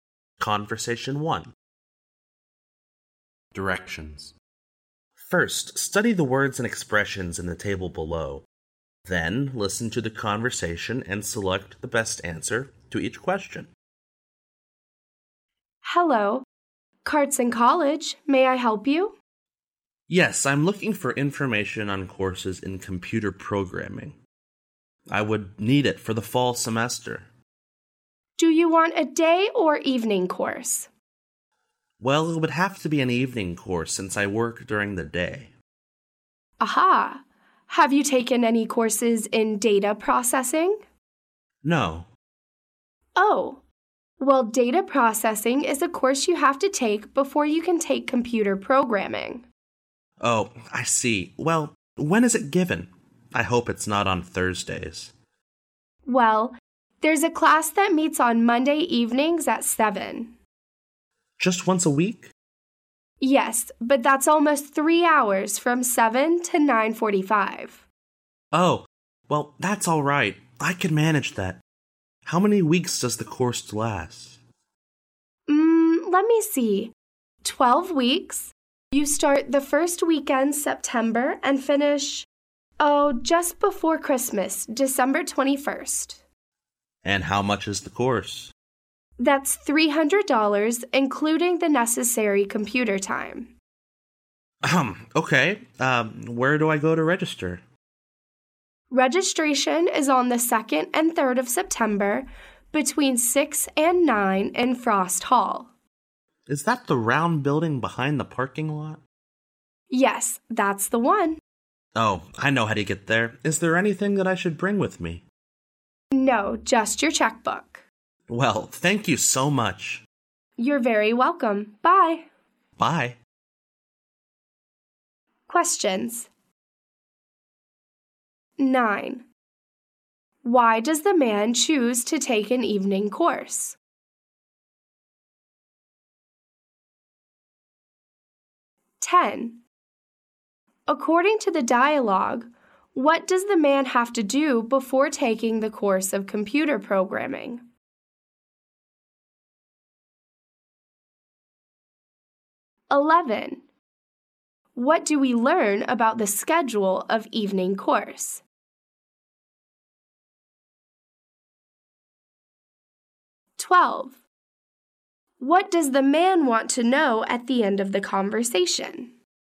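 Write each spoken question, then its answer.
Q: Why does the man choose to take an evening course?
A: Because he works during the day

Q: According to the dialogue, what does the man have to do before taking the course of computer programming?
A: Take a course in data processing

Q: What do we learn about the schedule of evening course?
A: It meets once a week on Monday evenings, 7 to 9:45, for 12 weeks

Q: What does the man want to know at the end of the conversation?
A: Whether he needs to bring anything with him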